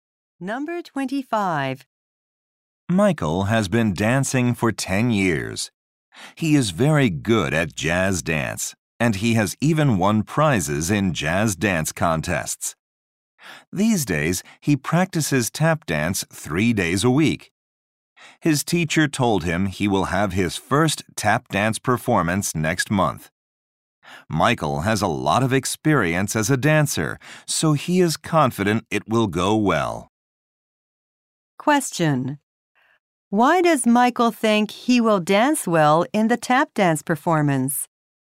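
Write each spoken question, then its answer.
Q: Why does Michael think he will dance well in the tap dance performance?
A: He has a lot of experience as a dancer.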